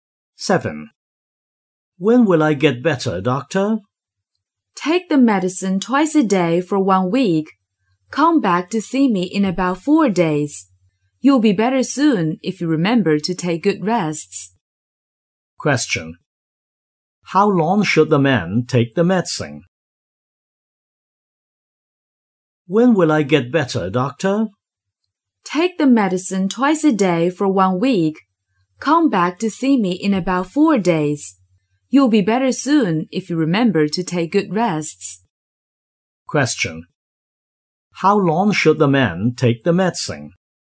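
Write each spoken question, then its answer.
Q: How long should the man take the medicine?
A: For one week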